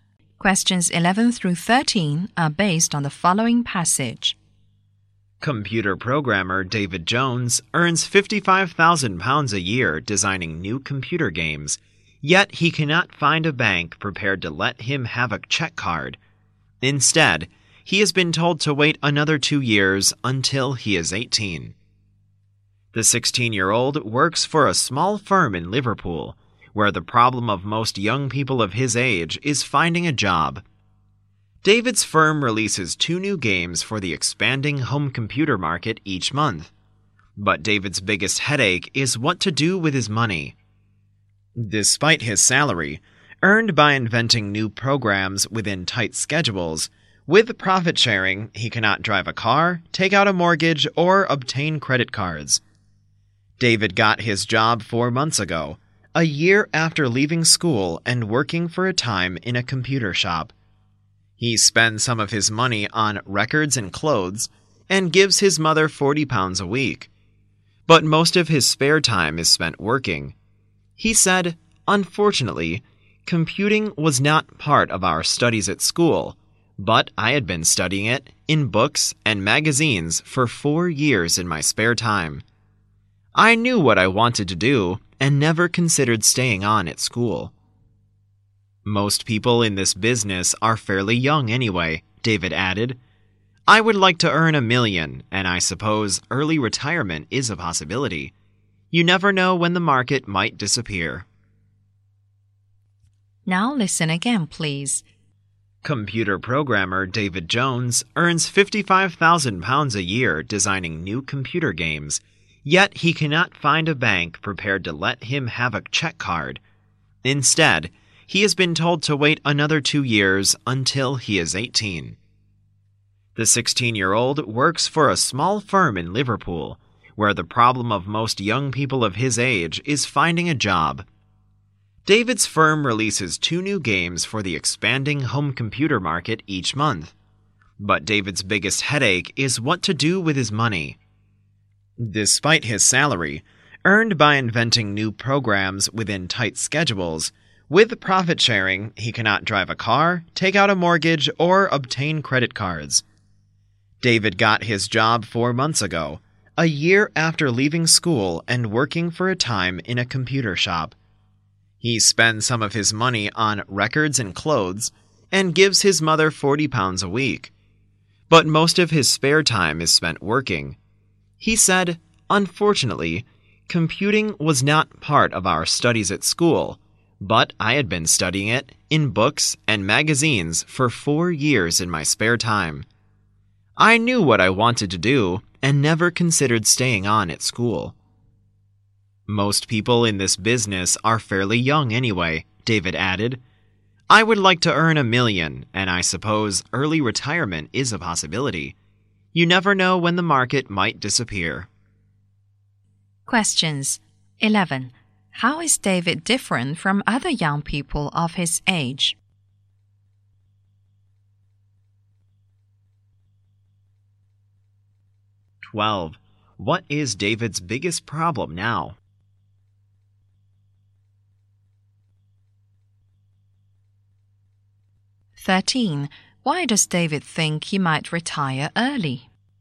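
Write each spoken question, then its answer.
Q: How is David different from other young people of his age?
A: He has a well-paid job, while most young people his age can't find one

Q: What is David's biggest problem now?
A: What to do with his money

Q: Why does David think he might retire early?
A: The market might disappear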